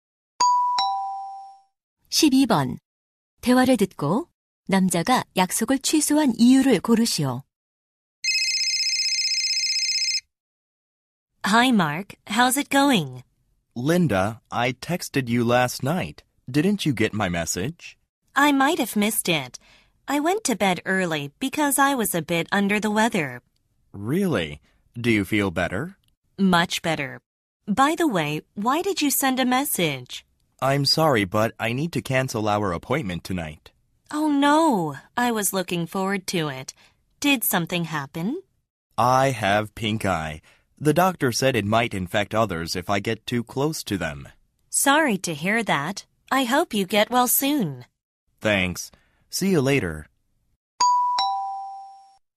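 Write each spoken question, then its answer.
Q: 대화를 듣고 남자가 약속을 취소한 이유를 고르시오.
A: 눈병(결막염)에 걸려서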